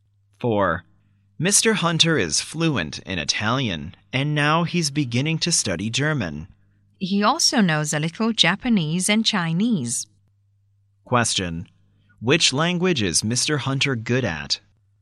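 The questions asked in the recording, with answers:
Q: Which language is Mr. Hunter good at?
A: Italian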